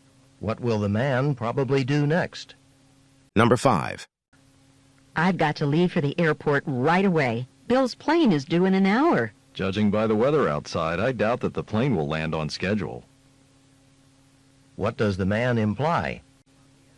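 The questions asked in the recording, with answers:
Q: What does the man imply?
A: Bill's plane will probably be late because of the weather.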